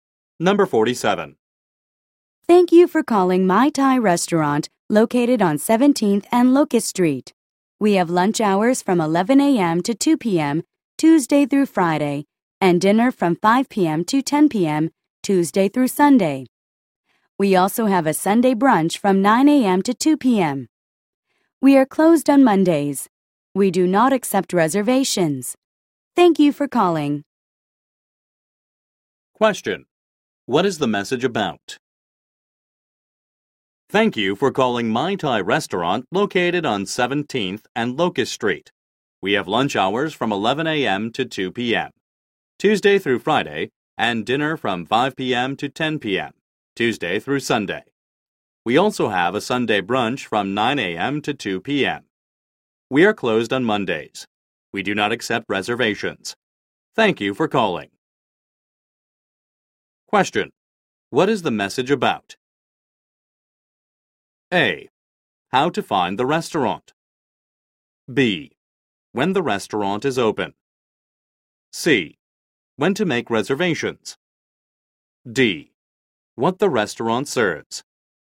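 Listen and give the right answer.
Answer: B: When the restaurant is open.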